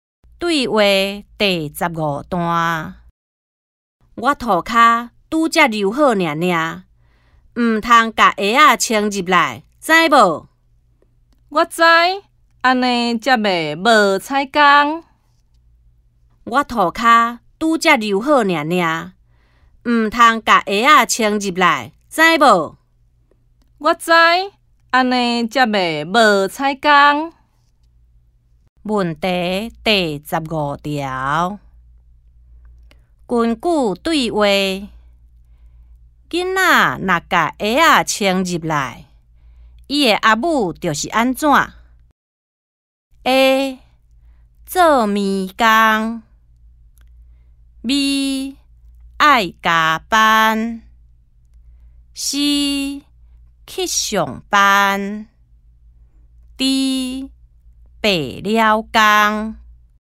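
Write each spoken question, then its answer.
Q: 根据对话,囡仔若把鞋仔穿入来,伊的阿母就是安怎?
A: D: 白了工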